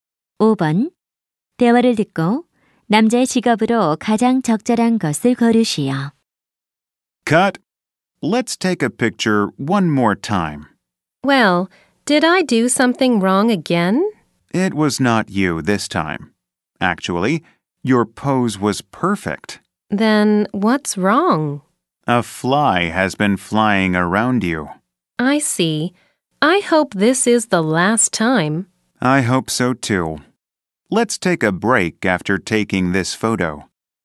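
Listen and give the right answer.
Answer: 사진작가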